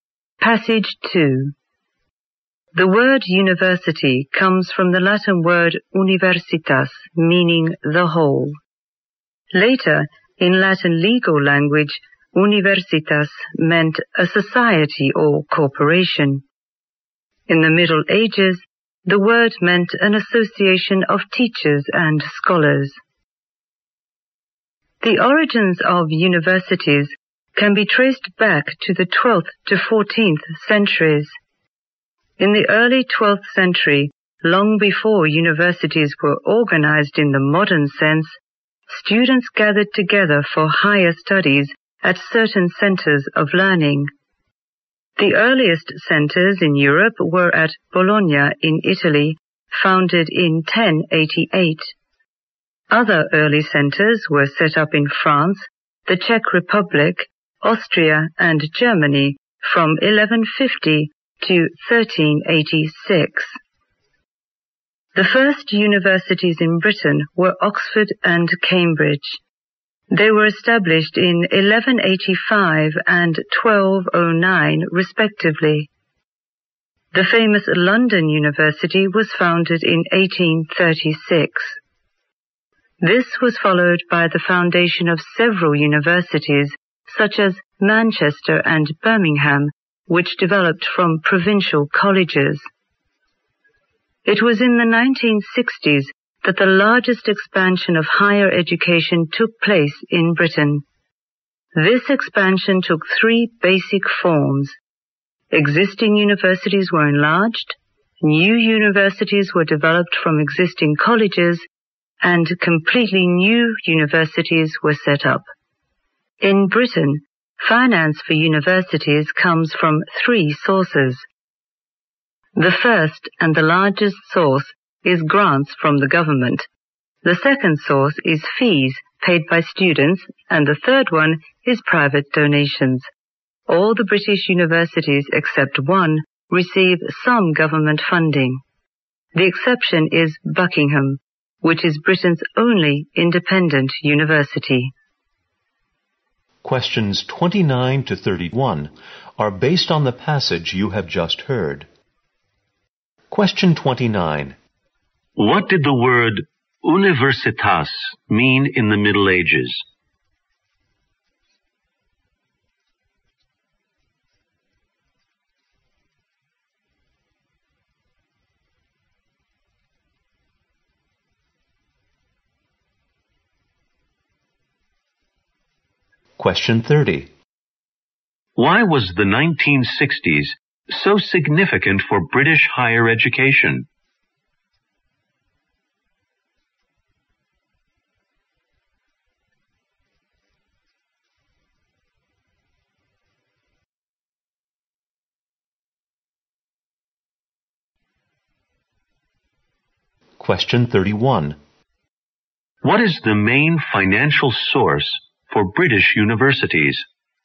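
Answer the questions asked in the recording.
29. An association of teachers and scholars.
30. It saw the largest expansion of higher education in Britain.
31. Government grants.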